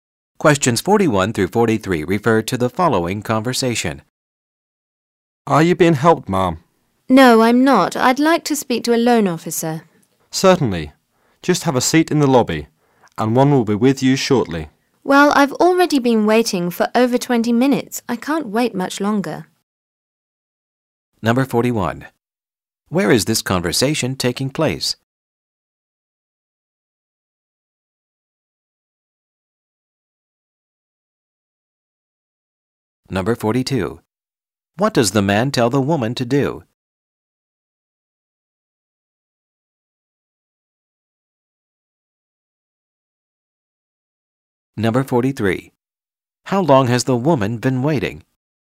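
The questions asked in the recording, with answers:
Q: What does the man tell the woman to do?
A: Have a seat in the lobby

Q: How long has the woman been waiting?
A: Over 20 minutes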